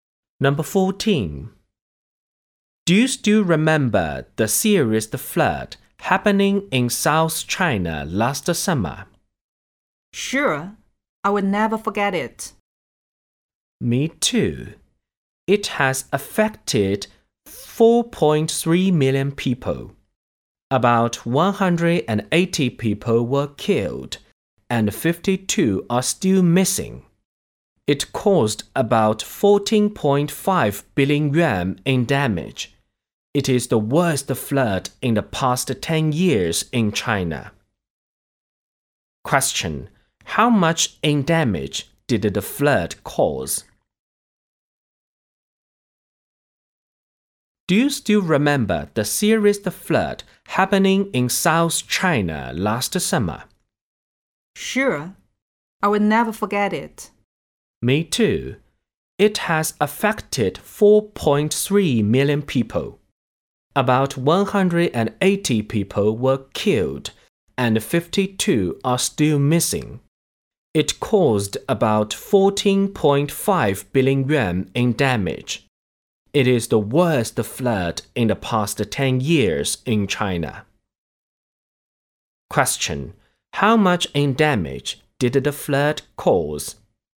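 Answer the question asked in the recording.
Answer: About 14.5 billion yuan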